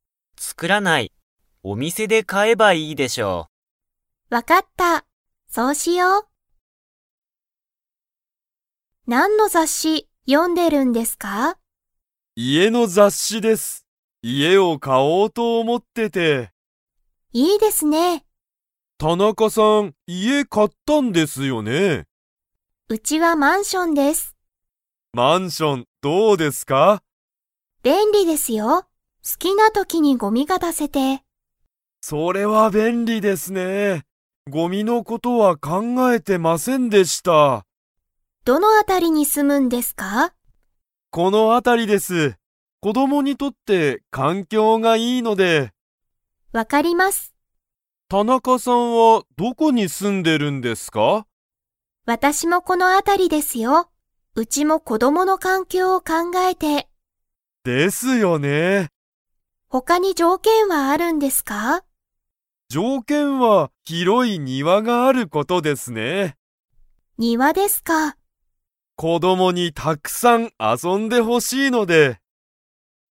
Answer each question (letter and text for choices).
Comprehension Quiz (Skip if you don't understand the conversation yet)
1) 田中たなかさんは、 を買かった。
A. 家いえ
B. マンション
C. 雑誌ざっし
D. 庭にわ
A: B. マンション

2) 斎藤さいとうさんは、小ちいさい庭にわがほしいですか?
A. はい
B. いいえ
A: B. いいえ

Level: Level 4